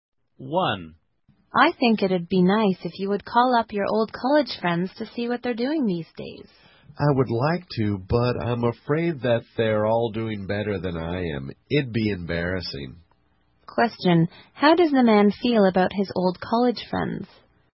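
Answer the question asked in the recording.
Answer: He fears they are all doing better than him, so calling them would be embarrassing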